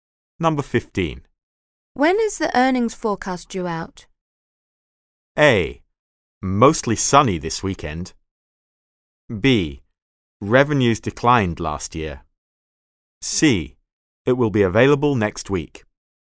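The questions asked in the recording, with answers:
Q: When is the earnings forecast due out?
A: C: It will be available next week.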